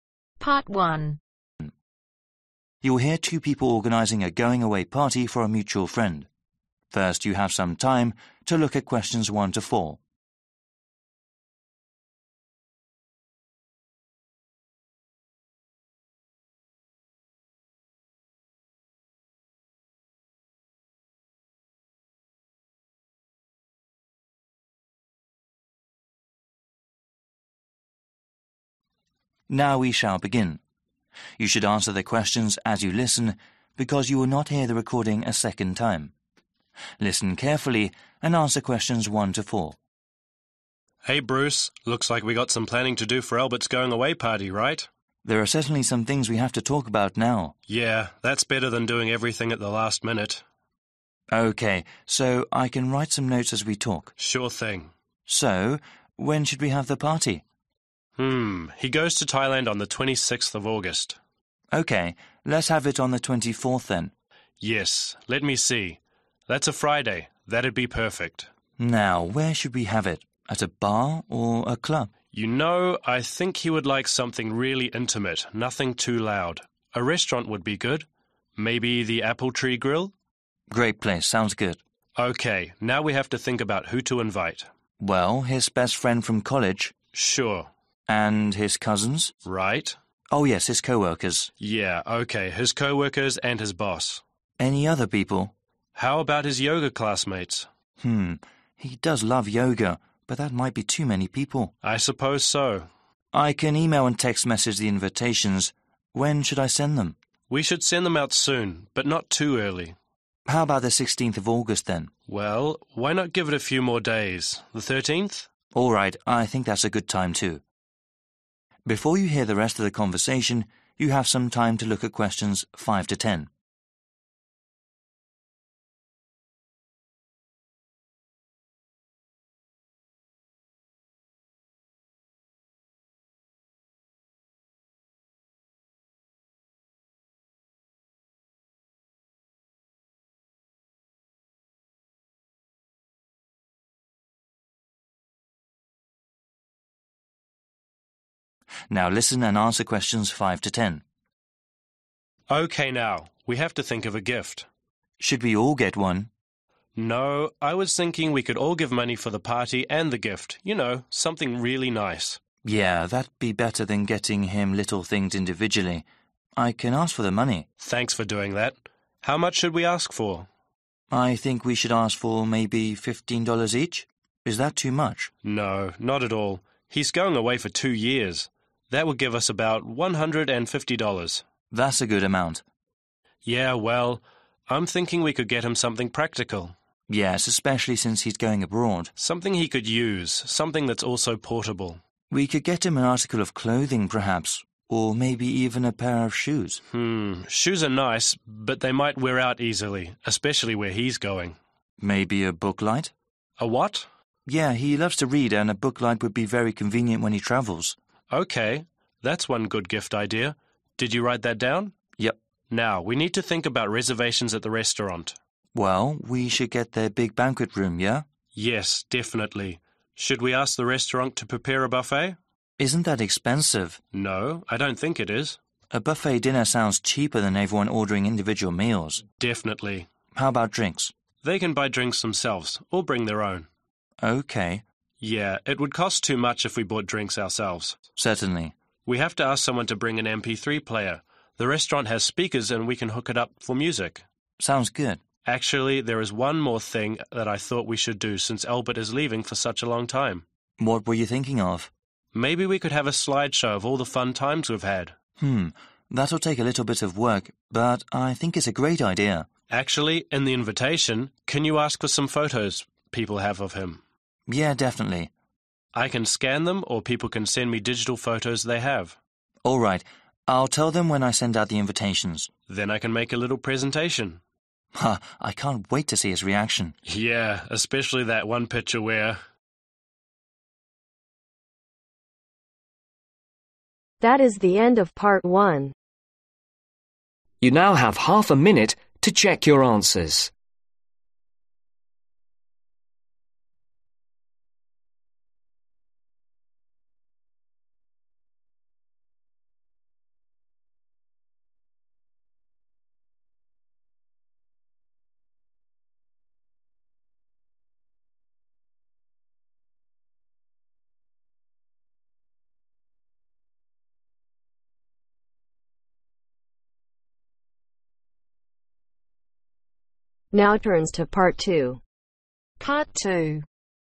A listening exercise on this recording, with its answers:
Complete the notes below. Write ONE WORD OR A NUMBER for each answer.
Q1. Place: (1)............ tree Grill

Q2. People to invite: Best (2)............ from college Cousins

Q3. (3)............ and boss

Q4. Date to send out invites: (4)............ of August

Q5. for this much money: (5) $............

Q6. Gift idea: (6)............ light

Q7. For the meal: Buffet (7)............ is probably cheaper than everyone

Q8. or (8)............ their own.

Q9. Ask people to bring: A/an (9)............ player for music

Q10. Digital (10)............ or ones that can be scanned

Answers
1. Apple
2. Friend
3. Coworkers
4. 13
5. 15
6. Book
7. Dinner
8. Bring
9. MP3
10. Photos